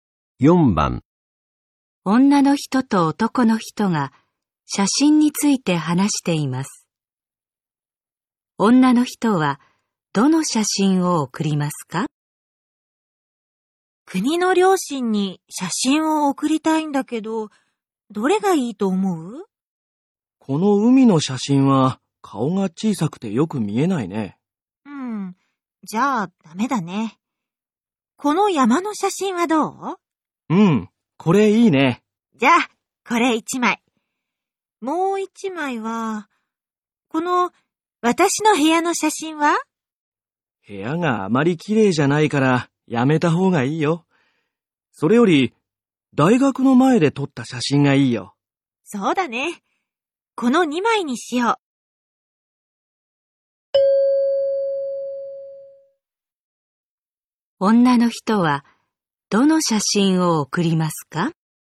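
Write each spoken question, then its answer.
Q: 女の人はどの写真を送りますか?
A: 山の写真と大学の前で撮った写真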